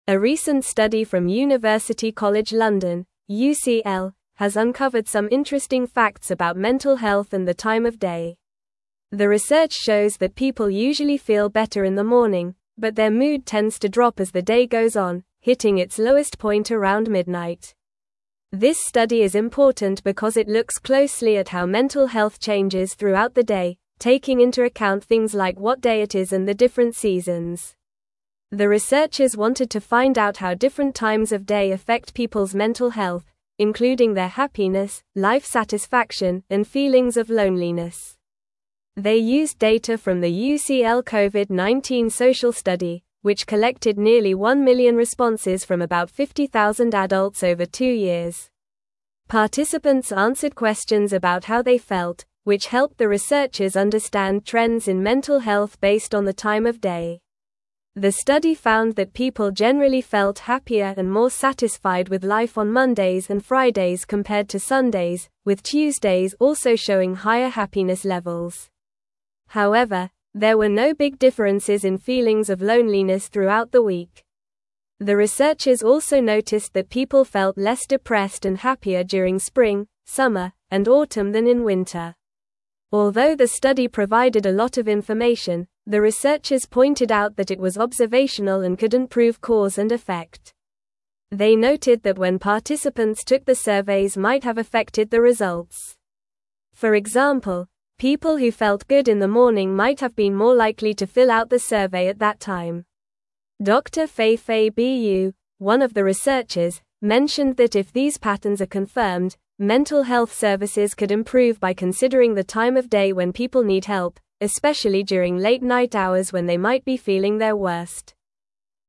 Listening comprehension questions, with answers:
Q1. A recent (1)______ from University College (2)______ (UCL) has uncovered some interesting facts about mental health and the time of day.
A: study

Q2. A recent (1)______ from University College (2)______ (UCL) has uncovered some interesting facts about mental health and the time of day.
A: London

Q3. The research (3)______ that people usually feel better in the (4)______, but their mood tends to drop as the day goes on, hitting its lowest point around midnight.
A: shows

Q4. The research (3)______ that people usually feel better in the (4)______, but their mood tends to drop as the day goes on, hitting its lowest point around midnight.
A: morning

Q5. The researchers wanted to find out how different times of day affect people's mental (5)______, including their happiness, life satisfaction, and feelings of (6)______.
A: health

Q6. The researchers wanted to find out how different times of day affect people's mental (5)______, including their happiness, life satisfaction, and feelings of (6)______.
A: loneliness

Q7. They used data from the UCL (7)______ social study, which collected nearly one million responses from about 50,000 adults over two years.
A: Covid-19

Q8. (8)______ answered questions about how they felt, which helped the researchers understand trends in mental health based on the time of day.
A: Participants

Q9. The study found that people generally felt (9)______ and more satisfied with life on Mondays and Fridays compared to Sundays, with Tuesdays also showing higher happiness (10)______.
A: happier

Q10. The study found that people generally felt (9)______ and more satisfied with life on Mondays and Fridays compared to Sundays, with Tuesdays also showing higher happiness (10)______.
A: levels

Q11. The researchers also noticed that people felt less depressed and happier during spring, summer, and (11)______ than in winter.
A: autumn

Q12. Although the study provided a lot of information, the researchers pointed out that it was (12)______ and couldn't prove cause and effect.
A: observational

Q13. For (13)______, people who felt good in the morning might have been more likely to fill out the survey at that time.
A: example

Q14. Dr. Feifei Bu, one of the researchers, mentioned that if these patterns are confirmed, (14)______ health (15)______ could (16)______ by considering the time of day when people need help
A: mental

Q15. Dr. Feifei Bu, one of the researchers, mentioned that if these patterns are confirmed, (14)______ health (15)______ could (16)______ by considering the time of day when people need help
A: services

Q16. Dr. Feifei Bu, one of the researchers, mentioned that if these patterns are confirmed, (14)______ health (15)______ could (16)______ by considering the time of day when people need help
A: improve

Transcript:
A recent study from University College London (UCL) has uncovered some interesting facts about mental health and the time of day. The research shows that people usually feel better in the morning, but their mood tends to drop as the day goes on, hitting its lowest point around midnight. This study is important because it looks closely at how mental health changes throughout the day, taking into account things like what day it is and the different seasons.
The researchers wanted to find out how different times of day affect people's mental health, including their happiness, life satisfaction, and feelings of loneliness. They used data from the UCL Covid-19 social study, which collected nearly one million responses from about 50,000 adults over two years. Participants answered questions about how they felt, which helped the researchers understand trends in mental health based on the time of day.
The study found that people generally felt happier and more satisfied with life on Mondays and Fridays compared to Sundays, with Tuesdays also showing higher happiness levels. However, there were no big differences in feelings of loneliness throughout the week. The researchers also noticed that people felt less depressed and happier during spring, summer, and autumn than in winter.
Although the study provided a lot of information, the researchers pointed out that it was observational and couldn't prove cause and effect. They noted that when participants took the surveys might have affected the results. For example, people who felt good in the morning might have been more likely to fill out the survey at that time. Dr. Feifei Bu, one of the researchers, mentioned that if these patterns are confirmed, mental health services could improve by considering the time of day when people need help, especially during late-night hours when they might be feeling their worst.

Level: Level 3